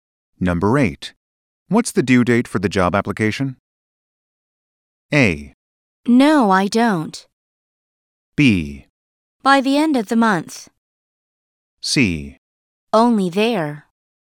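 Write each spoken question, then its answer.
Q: What's the due date for the job application?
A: B: By the end of the month.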